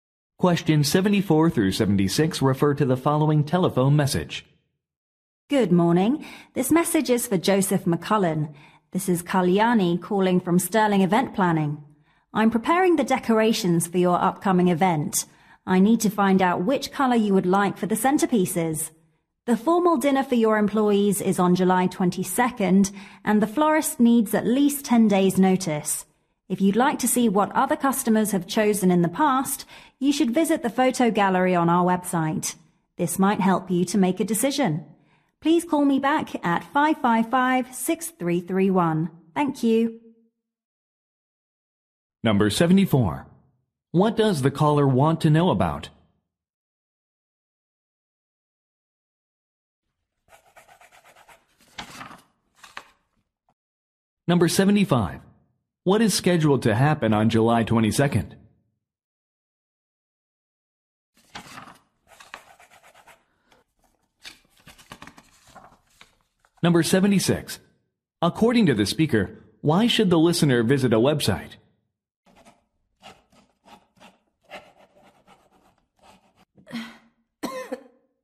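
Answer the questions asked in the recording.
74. The color for the centerpieces
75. A formal dinner for employees
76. To see photos of what other customers chose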